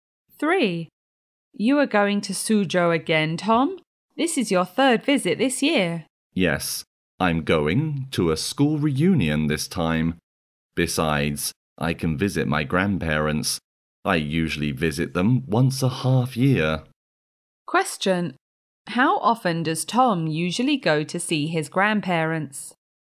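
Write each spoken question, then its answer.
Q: how often does Tom usually go to see his grandparents?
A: Twice a year (once every half year)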